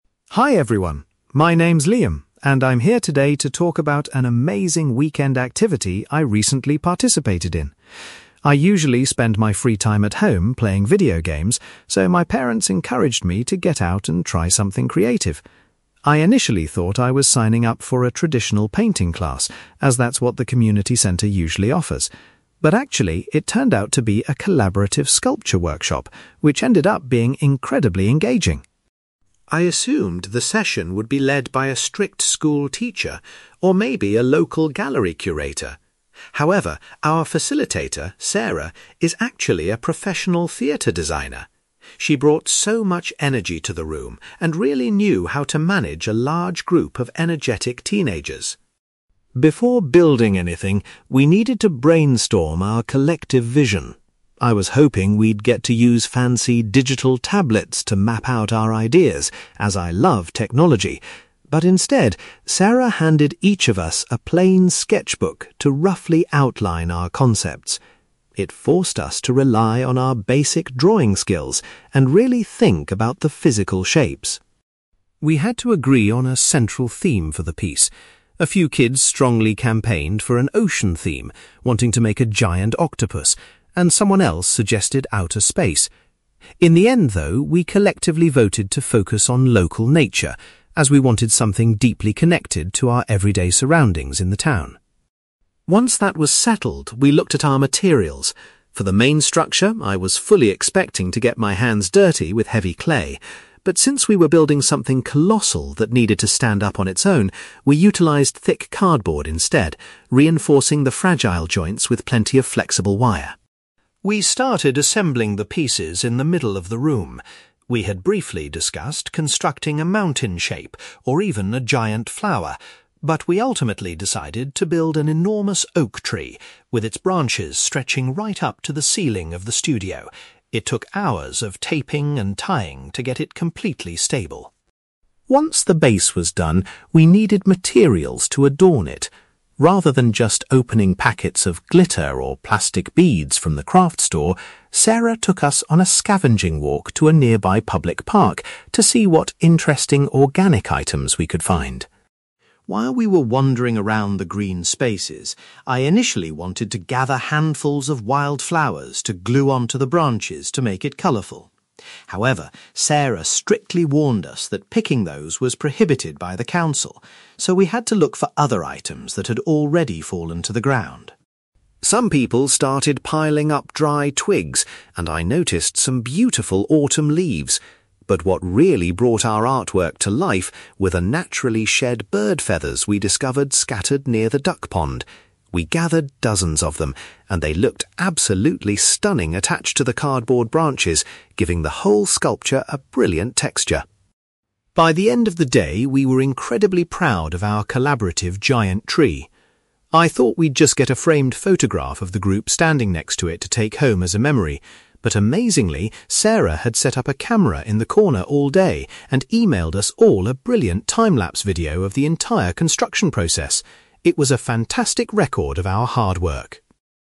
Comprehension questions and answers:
You will hear a boy called Liam giving a presentation about a weekend art workshop he attended. For questions 9-18, complete the sentences with a word or short phrase.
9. Liam was anticipating a painting class, but the event was genuinely a (9)........................... .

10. The youth group was guided by a (10)........................... rather than a regular educator.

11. Instead of modern tech, the teenagers used a (11)........................... to draft their initial designs.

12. The group ultimately decided that the project's central motif would be (12)........................... .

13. To create the massive framework, the youths relied on wire and (13)........................... rather than clay.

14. The teenagers collaborated to form a huge replica of an (14)........................... .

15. To find natural embellishments for their art, the group went to a (15)........................... .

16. The instructor told the teenagers that they were not allowed to collect (16)........................... for their artwork.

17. Liam felt that the (17)........................... they collected by the water made the sculpture look spectacular.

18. As a record of their hard work, the participants received a (18)........................... from the facilitator.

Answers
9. sculpture workshop
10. theatre designer
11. sketchbook
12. local nature
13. thick cardboard
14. oak tree
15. public park
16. wild flowers
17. bird feathers
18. time-lapse video

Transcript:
Liam: Hi everyone. My name's Liam, and I'm here today to talk about an amazing weekend activity I recently participated in. I usually spend my free time at home playing video games, so my parents encouraged me to get out and try something creative. I initially thought I was signing up for a traditional painting class, as that's what the community centre usually offers. But actually, it turned out to be a collaborative sculpture workshop, which ended up being incredibly engaging.
I assumed the session would be led by a strict school teacher, or maybe a local gallery curator. However, our facilitator, Sarah, is actually a professional theatre designer. She brought so much energy to the room and really knew how to manage a large group of energetic teenagers.
Before building anything, we needed to brainstorm our collective vision. I was hoping we'd get to use fancy digital tablets to map out our ideas, as I love technology, but instead, Sarah handed each of us a plain sketchbook to roughly outline our concepts. It forced us to rely on our basic drawing skills and really think about the physical shapes.
We had to agree on a central theme for the piece. A few kids strongly campaigned for an ocean theme, wanting to make a giant octopus, and someone else suggested outer space. In the end, though, we collectively voted to focus on local nature, as we wanted something deeply connected to our everyday surroundings in the town.
Once that was settled, we looked at our materials. For the main structure, I was fully expecting to get my hands dirty with heavy clay. But since we were building something colossal that needed to stand up on its own, we utilized thick cardboard instead, reinforcing the fragile joints with plenty of flexible wire.
We started assembling the pieces in the middle of the room. We had briefly discussed constructing a mountain shape, or even a giant flower. But we ultimately decided to build an enormous oak tree, with its branches stretching right up to the ceiling of the studio. It took hours of taping and tying to get it completely stable.
Once the base was done, we needed materials to adorn it. Rather than just opening packets of glitter or plastic beads from the craft store, Sarah took us on a scavenging walk to a nearby public park to see what interesting organic items we could find.
While we were wandering around the green spaces, I initially wanted to gather handfuls of wild flowers to glue onto the branches to make it colourful. However, Sarah strictly warned us that picking those was prohibited by the council, so we had to look for other items that had already fallen to the ground.
Some people started piling up dry twigs, and I noticed some beautiful autumn leaves. But what really brought our artwork to life were the naturally shed bird feathers we discovered scattered near the duck pond. We gathered dozens of them, and they looked absolutely stunning attached to the cardboard branches, giving the whole sculpture a brilliant texture.
By the end of the day, we were incredibly proud of our collaborative giant tree. I thought we'd just get a framed photograph of the group standing next to it to take home as a memory. But amazingly, Sarah had set up a camera in the corner all day and emailed us all a brilliant time-lapse video of the entire construction process! It was a fantastic record of our hard work.

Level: B2